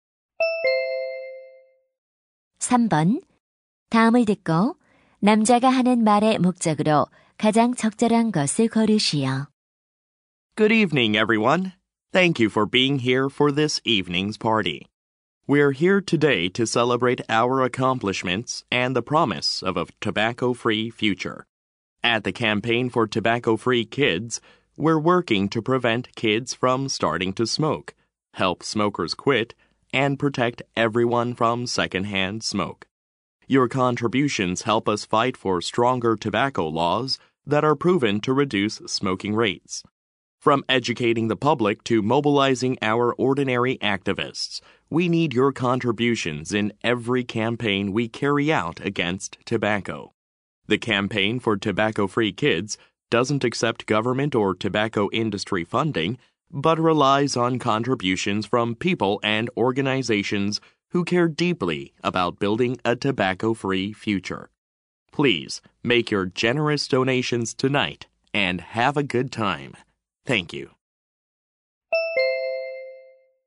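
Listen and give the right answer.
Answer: 금연 캠페인 단체에 기부를 요청하려고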